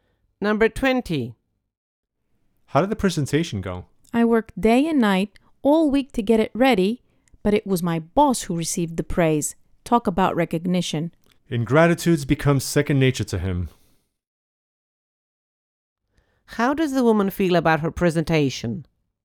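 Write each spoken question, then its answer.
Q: How does the woman feel about her presentation?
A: She feels unappreciated because her boss got the credit.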